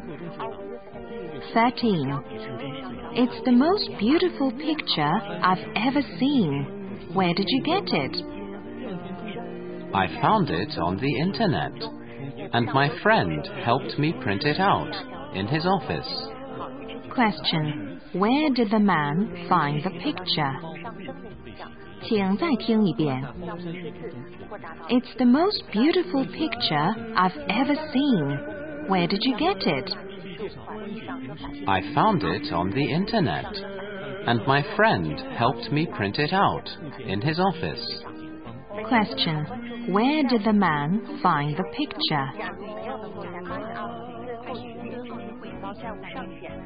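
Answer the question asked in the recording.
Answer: On the internet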